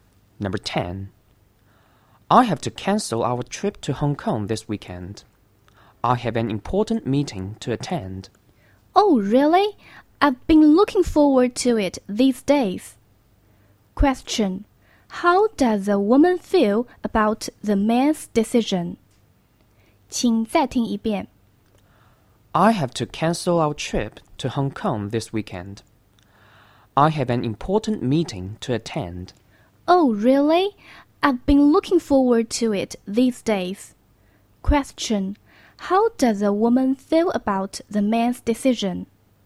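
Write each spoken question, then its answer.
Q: Question. How does a woman feel about the man's decision?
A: Disappointed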